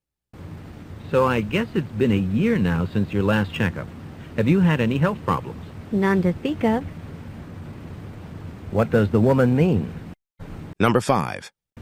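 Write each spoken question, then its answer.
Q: What does the woman mean?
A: She hasn't had any real health problems.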